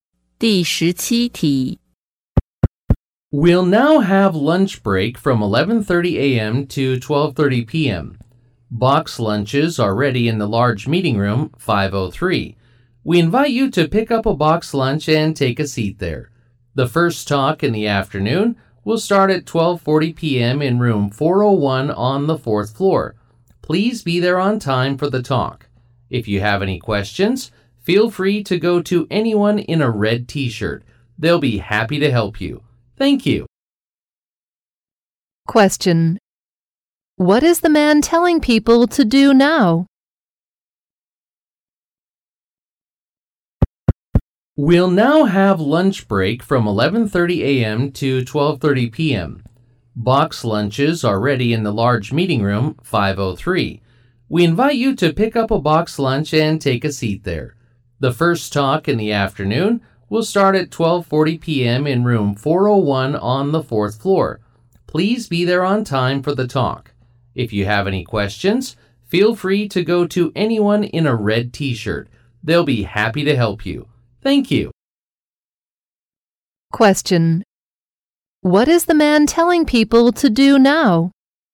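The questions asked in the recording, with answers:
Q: What is the man telling people to do now?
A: Go to meeting room 503, get a box lunch and eat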